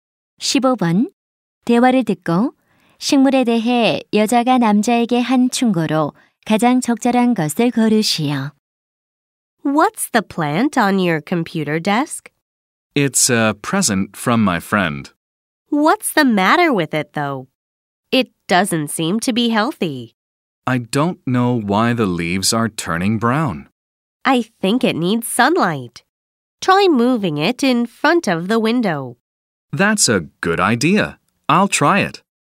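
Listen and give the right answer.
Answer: 창문 앞으로 옮겨 햇빛을 받게 하라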